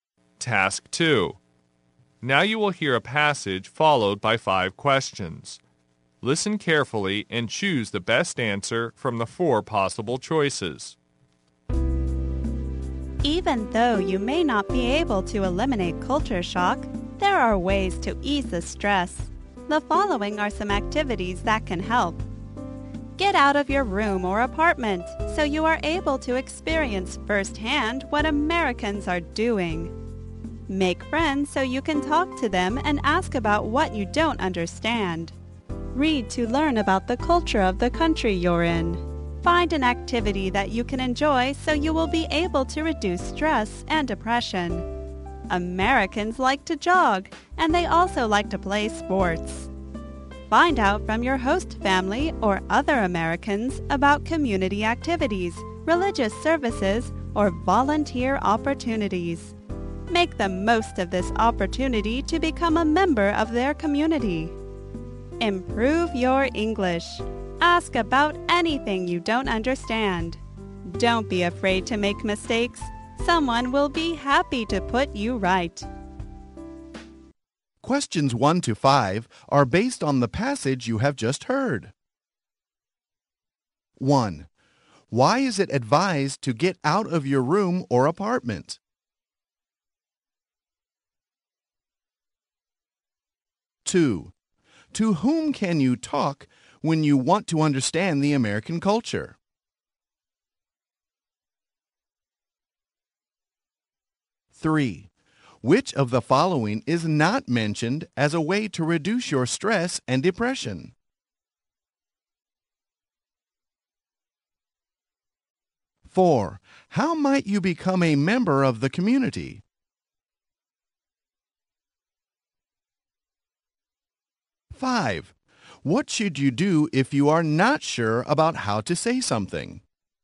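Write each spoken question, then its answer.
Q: Why is it advised to get out of your room or apartment?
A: To experience firsthand what Americans are doing

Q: To whom can you talk when you want to understand the American culture?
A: Friends / your host family or other Americans

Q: How might you become a member of the community?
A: By taking part in community activities, religious services or volunteer opportunities

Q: What should you do if you are not sure about how to say something?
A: Ask and not be afraid to make mistakes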